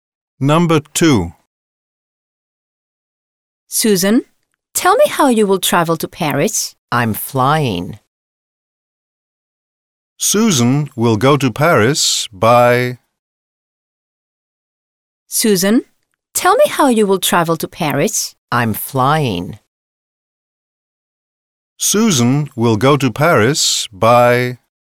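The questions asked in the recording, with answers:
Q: Susan will go to Paris by...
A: plane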